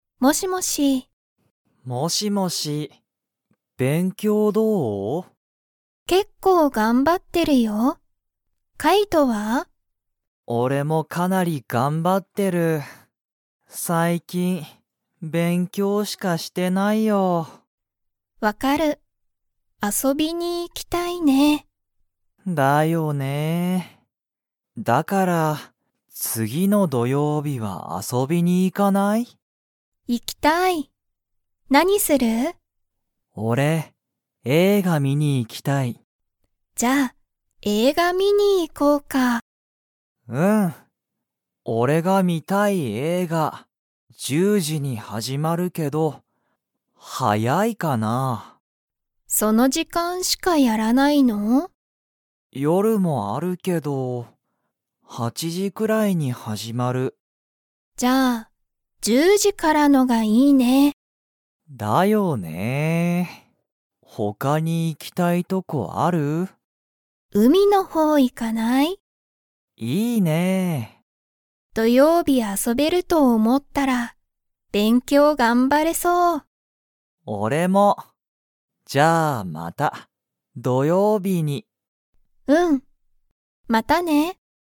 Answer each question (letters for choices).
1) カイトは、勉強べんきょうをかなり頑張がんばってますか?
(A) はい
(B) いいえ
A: A

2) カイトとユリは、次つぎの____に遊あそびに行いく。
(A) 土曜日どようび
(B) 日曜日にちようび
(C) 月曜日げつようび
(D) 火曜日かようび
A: A

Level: Level 2